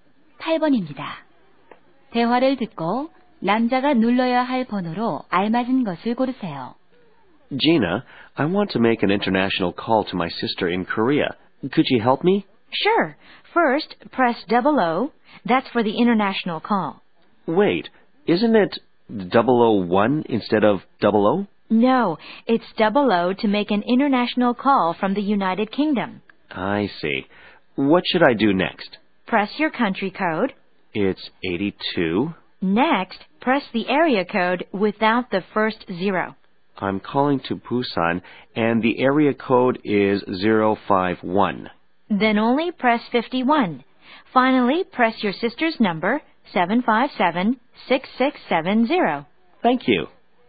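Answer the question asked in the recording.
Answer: 00-82-51-757-6670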